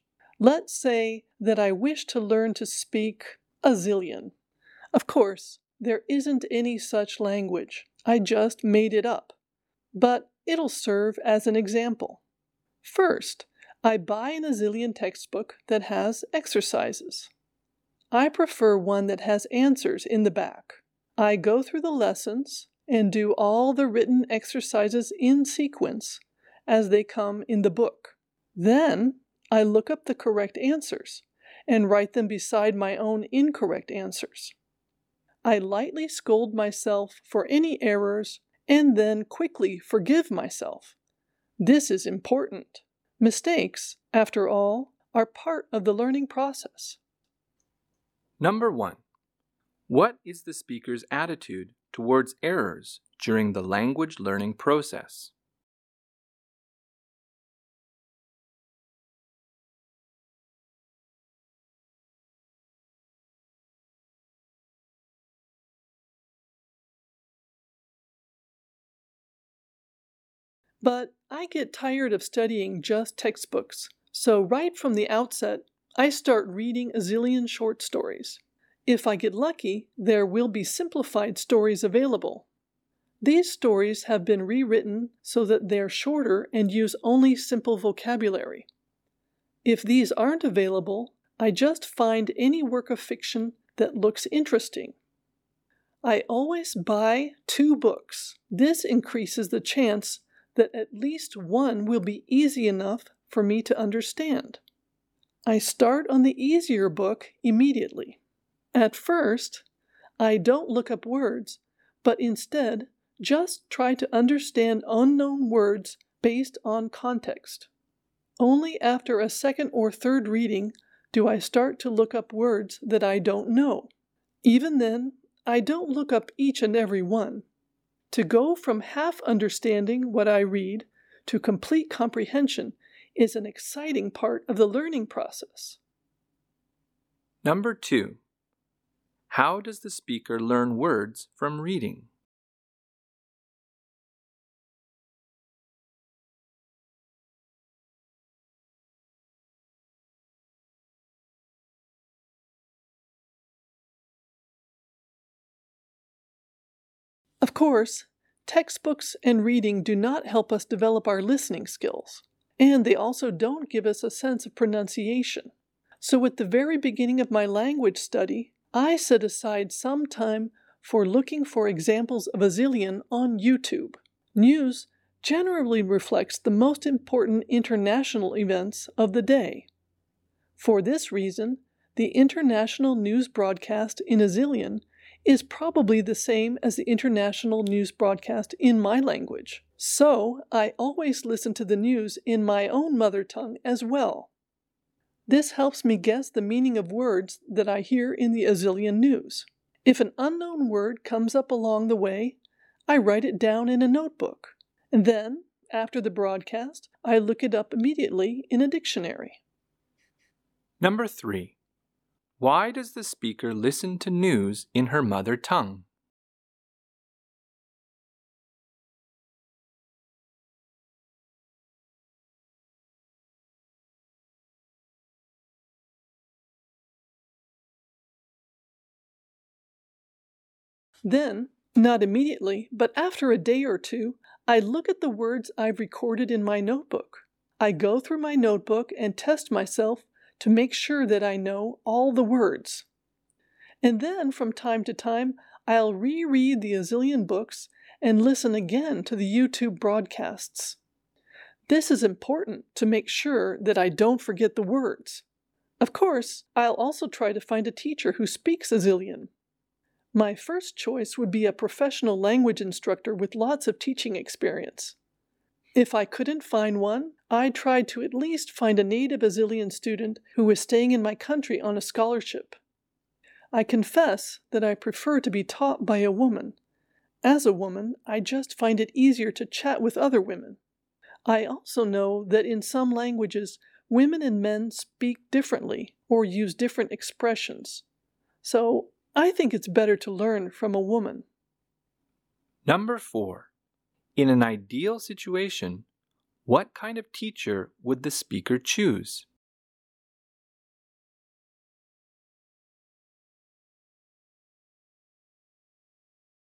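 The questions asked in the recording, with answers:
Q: what is the speaker's attitude towards errors during the language learning process?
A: Mistakes are part of learning, so she scolds herself lightly and quickly forgives herself.

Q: how does the speaker learn words from reading?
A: First she guesses unknown words from context, and only after a second or third reading does she look some of them up.

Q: Why does the speaker listen to news in her mother tongue?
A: It helps her guess the meaning of words she hears in the Azilian news.

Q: In an ideal situation, what kind of teacher would the speaker choose?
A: A professional female language instructor with lots of teaching experience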